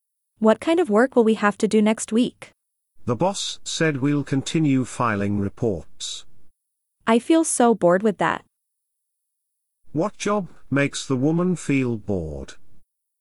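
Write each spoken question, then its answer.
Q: What job makes the woman feel bored?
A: Filing reports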